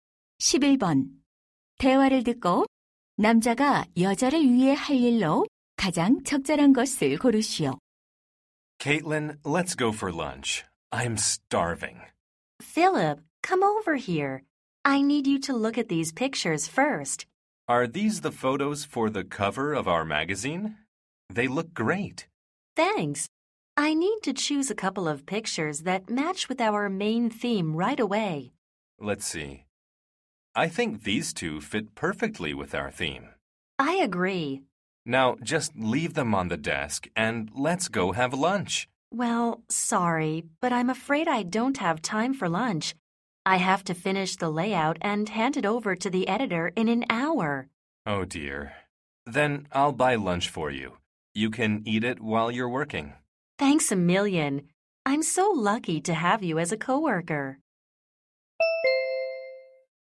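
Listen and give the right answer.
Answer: 점심 사다 주기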